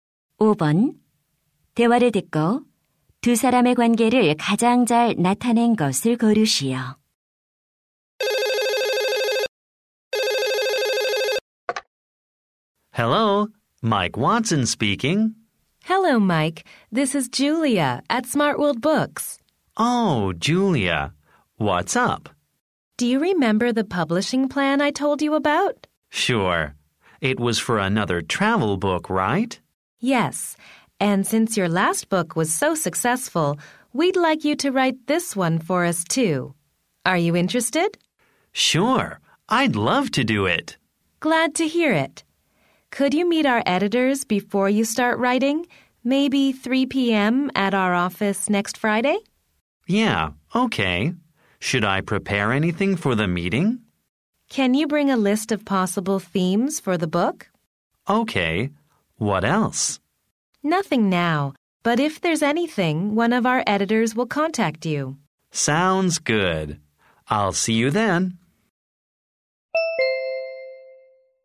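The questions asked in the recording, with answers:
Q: 대화를 듣고 두 사람의 관계를 가장 잘 나타낸 것을 고르시오.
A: 작가 - 출판사 직원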